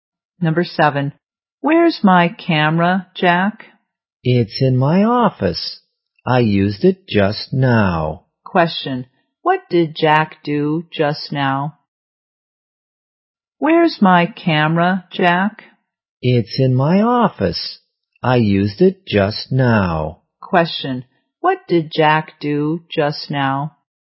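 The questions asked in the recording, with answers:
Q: Question, what did Jack do just now?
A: He used the camera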